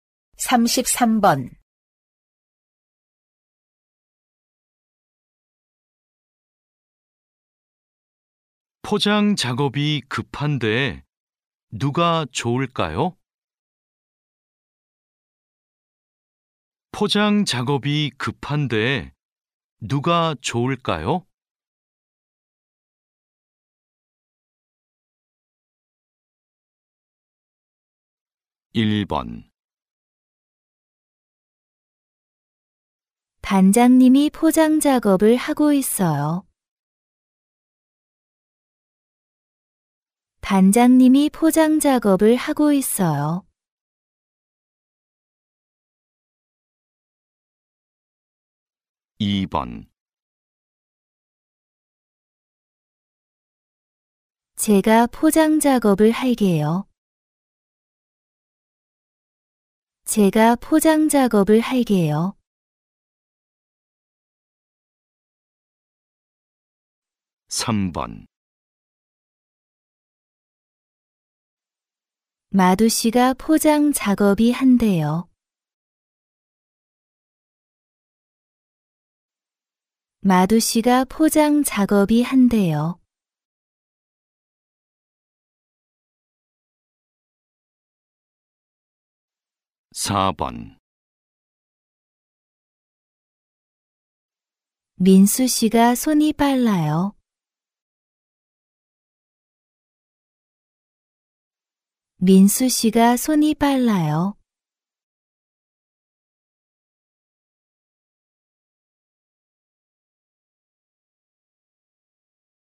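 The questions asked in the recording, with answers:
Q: 포장 작업이 급한데 누가 좋을까요?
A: 4: 민수 씨가 손이 빨라요.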